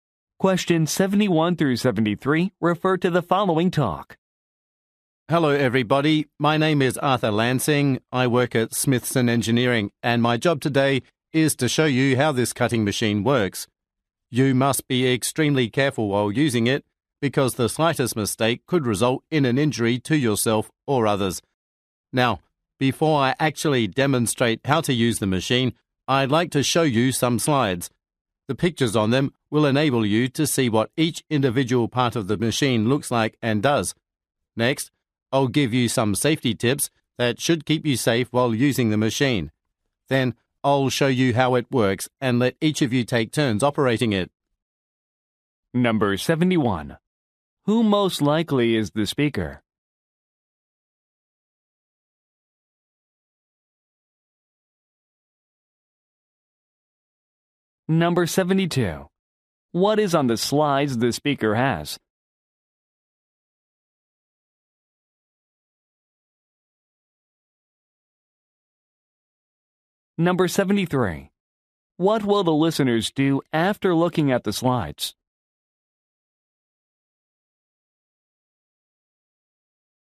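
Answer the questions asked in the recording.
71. An employee of Smithson Engineering demonstrating a cutting machine
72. Pictures of the machine's individual parts
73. Hear safety tips, then take turns operating the machine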